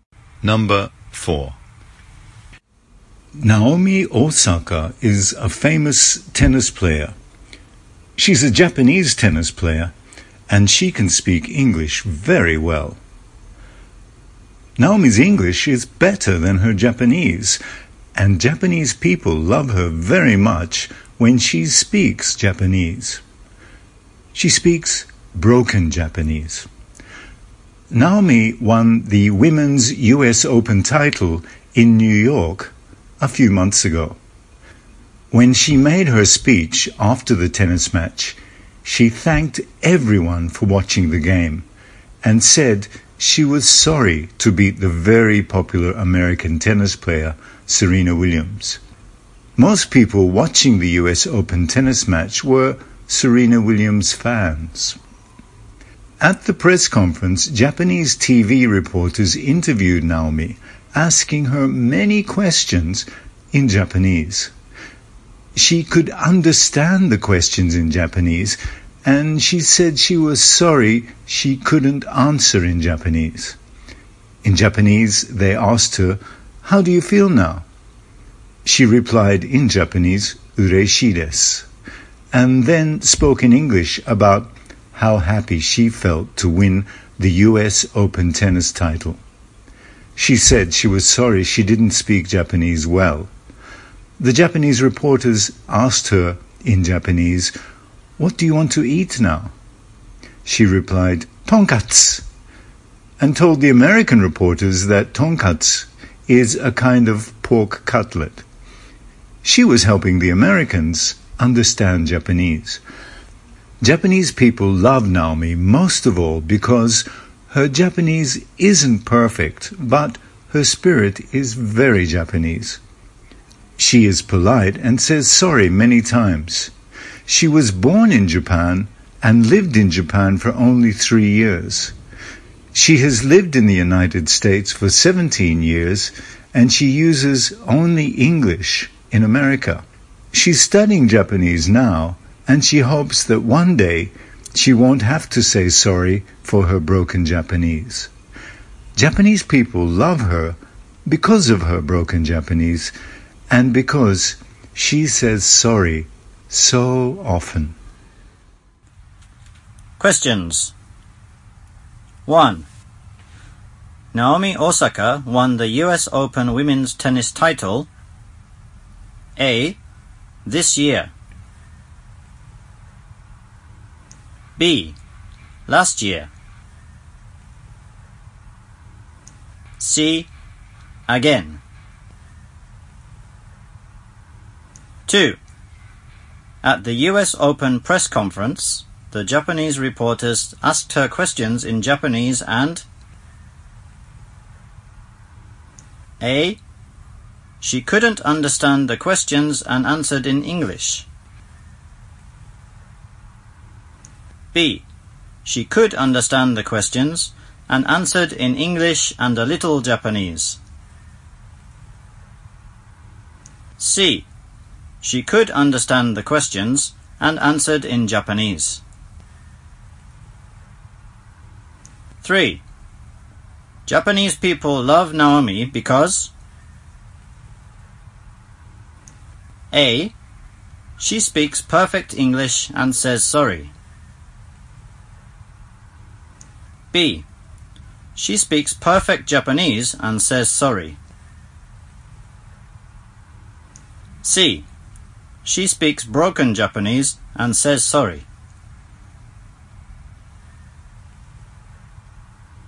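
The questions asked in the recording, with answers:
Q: At the US Open press conference, the Japanese reporters asked her questions in Japanese and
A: B: She could understand the questions and answered in English and a little Japanese.

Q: Japanese people love Naomi because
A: C: She speaks broken Japanese and says sorry.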